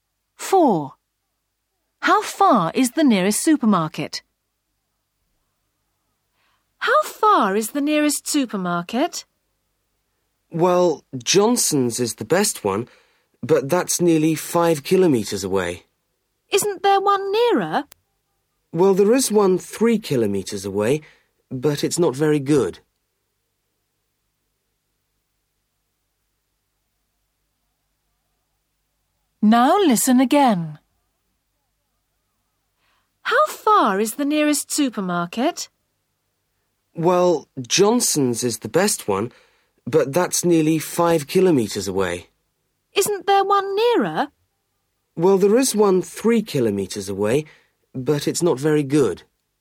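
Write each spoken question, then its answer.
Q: How far is the nearest supermarket?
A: 3 kilometres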